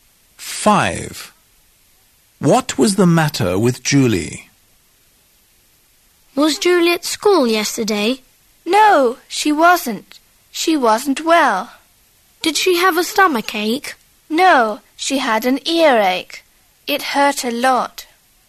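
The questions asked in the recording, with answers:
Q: What was the matter with Julie?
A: she had an earache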